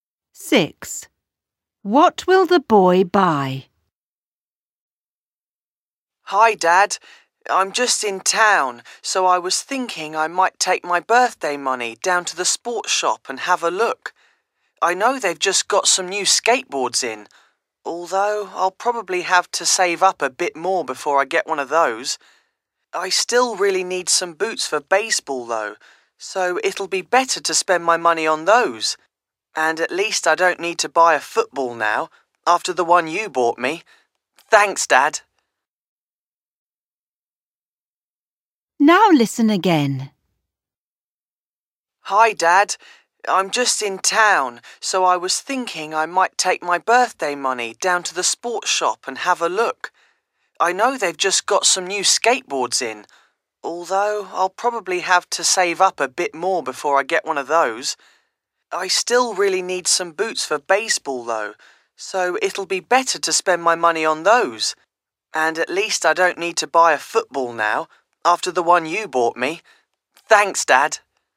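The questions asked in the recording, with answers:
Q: What will the boy buy?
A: Baseball boots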